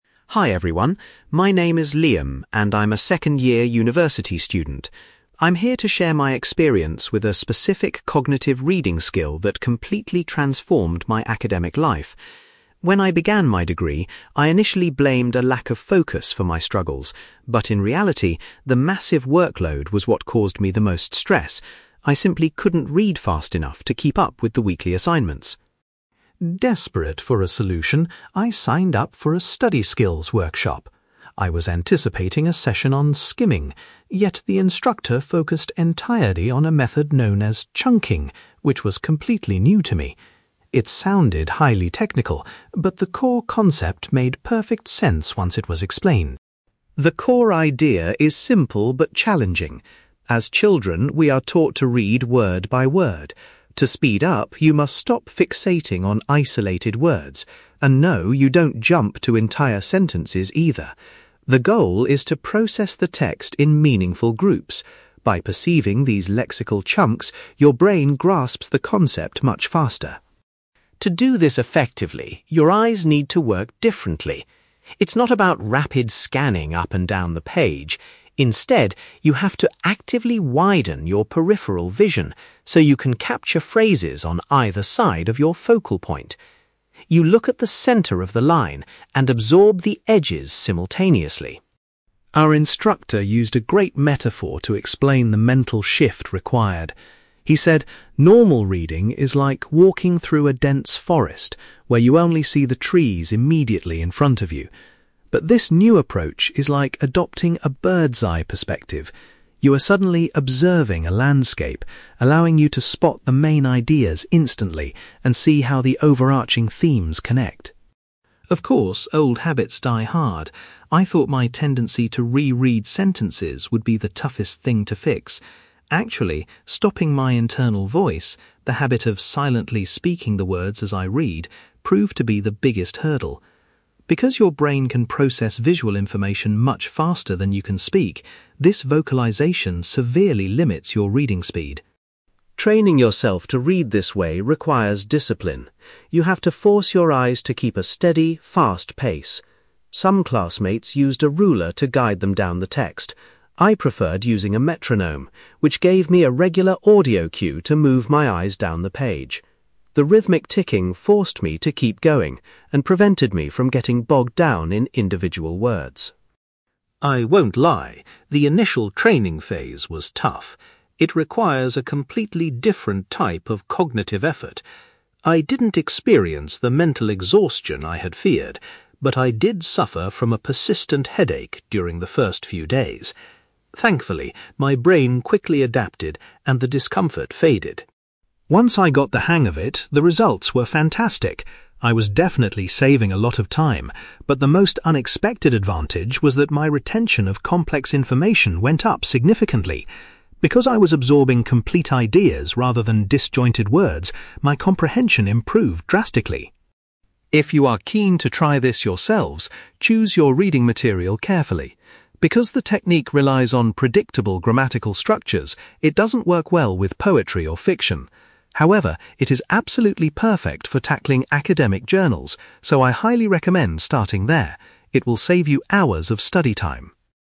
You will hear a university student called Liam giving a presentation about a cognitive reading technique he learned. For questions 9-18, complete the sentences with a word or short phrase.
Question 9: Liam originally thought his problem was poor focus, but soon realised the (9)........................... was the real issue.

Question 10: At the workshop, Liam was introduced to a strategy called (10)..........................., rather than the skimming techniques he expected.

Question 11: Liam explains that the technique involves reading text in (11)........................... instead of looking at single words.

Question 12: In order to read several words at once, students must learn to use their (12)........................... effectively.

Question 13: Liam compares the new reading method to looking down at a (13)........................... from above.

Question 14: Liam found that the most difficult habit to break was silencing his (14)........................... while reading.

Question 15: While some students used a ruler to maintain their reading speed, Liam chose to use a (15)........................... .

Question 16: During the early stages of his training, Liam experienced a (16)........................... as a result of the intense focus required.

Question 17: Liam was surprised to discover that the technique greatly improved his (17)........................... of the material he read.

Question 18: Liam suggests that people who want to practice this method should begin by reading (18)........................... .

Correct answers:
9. workload
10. chunking
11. meaningful groups
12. peripheral vision
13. landscape
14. internal voice
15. metronome
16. headache
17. retention
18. academic journals

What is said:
Liam: Hi everyone, my name is Liam, and I'm a second-year university student. I'm here to share my experience with a specific cognitive reading skill that completely transformed my academic life. When I began my degree, I initially blamed a lack of focus for my struggles, but in reality, the massive workload was what caused me the most stress. I simply couldn't read fast enough to keep up with the weekly assignments.
Desperate for a solution, I signed up for a study skills workshop. I was anticipating a session on skimming, yet the instructor focused entirely on a method known as chunking, which was completely new to me. It sounded highly technical, but the core concept made perfect sense once it was explained.
The core idea is simple but challenging. As children, we are taught to read word by word. To speed up, you must stop fixating on isolated words. And no, you don't jump to entire sentences either. The goal is to process the text in meaningful groups. By perceiving these lexical chunks, your brain grasps the concept much faster.
To do this effectively, your eyes need to work differently. It's not about rapid scanning up and down the page. Instead, you have to actively widen your peripheral vision so you can capture phrases on either side of your focal point. You look at the centre of the line and absorb the edges simultaneously.
Our instructor used a great metaphor to explain the mental shift required. He said normal reading is like walking through a dense forest, where you only see the trees immediately in front of you. But this new approach is like adopting a bird's-eye perspective. You are suddenly observing a landscape, allowing you to spot the main ideas instantly and see how the overarching themes connect.
Of course, old habits die hard. I thought my tendency to re-read sentences would be the toughest thing to fix. Actually, stopping my internal voice—the habit of silently speaking the words as I read—proved to be the biggest hurdle. Because your brain can process visual information much faster than you can speak, this vocalisation severely limits your reading speed.
Training yourself to read this way requires discipline. You have to force your eyes to keep a steady, fast pace. Some classmates used a ruler to guide them down the text. I preferred using a metronome, which gave me a regular audio cue to move my eyes down the page. The rhythmic ticking forced me to keep going and prevented me from getting bogged down in individual words.
I won't lie, the initial training phase was tough. It requires a completely different type of cognitive effort. I didn't experience the mental exhaustion I had feared, but I did suffer from a persistent headache during the first few days. Thankfully, my brain quickly adapted, and the discomfort faded.
Once I got the hang of it, the results were fantastic. I was definitely saving a lot of time, but the most unexpected advantage was that my retention of complex information went up significantly. Because I was absorbing complete ideas rather than disjointed words, my comprehension improved drastically.
If you are keen to try this yourselves, choose your reading material carefully. Because the technique relies on predictable grammatical structures, it doesn't work well with poetry or fiction. However, it is absolutely perfect for tackling academic journals, so I highly recommend starting there. It will save you hours of study time!

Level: B2